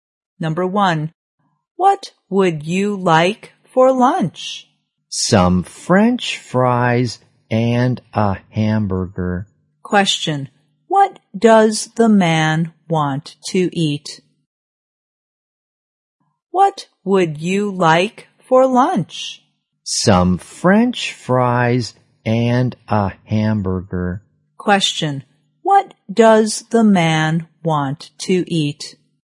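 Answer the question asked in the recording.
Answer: Some French fries and a hamburger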